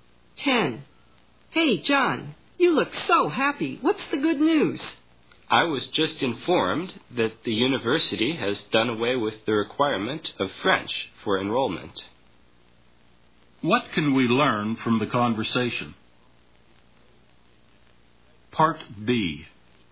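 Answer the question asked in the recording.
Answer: The university no longer requires French for enrollment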